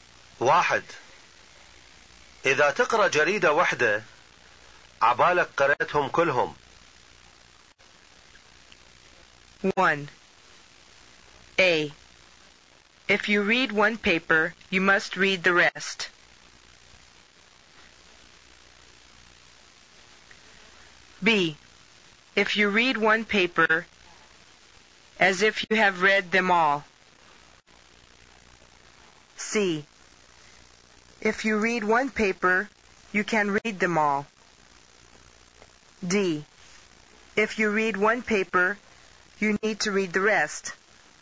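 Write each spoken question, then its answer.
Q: واحد. إذا تقرأ جريدة واحدة عبالك قرأتهم كلهم.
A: B: If you read one paper as if you have read them all.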